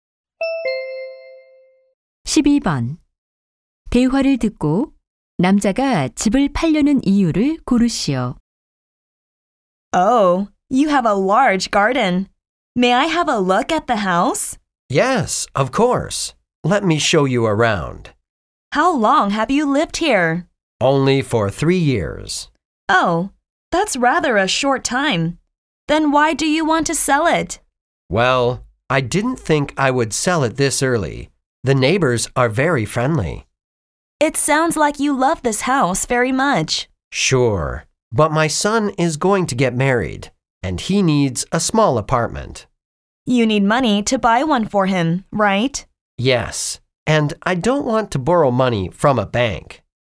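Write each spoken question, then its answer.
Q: 대화를 듣고 남자가 집을 팔려는 이유를 고르시오.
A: 결혼하는 아들에게 아파트를 사 주려고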